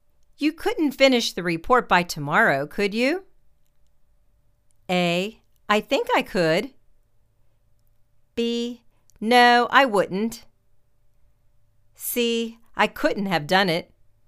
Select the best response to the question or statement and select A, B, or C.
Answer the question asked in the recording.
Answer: I think I could.